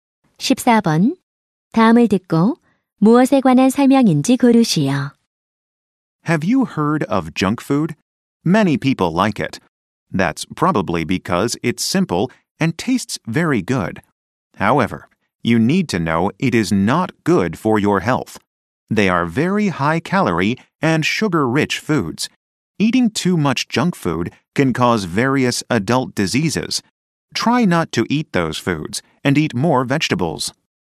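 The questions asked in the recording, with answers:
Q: 다음을 듣고 무엇에 관한 설명인지 고르시오.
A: 정크 푸드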